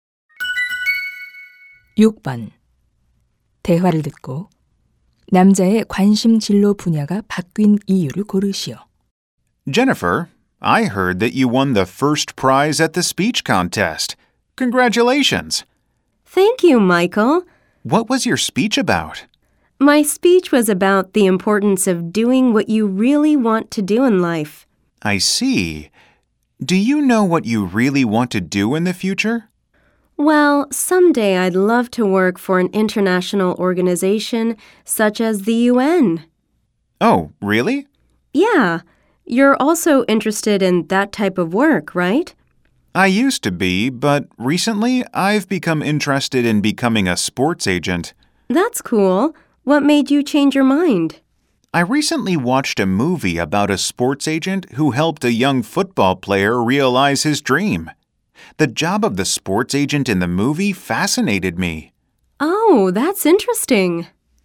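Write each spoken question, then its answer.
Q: 대화를 듣고 남자의 관심 진로 분야가 바뀐 이유를 고르시오.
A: 스포츠 에이전트에 관한 영화를 보고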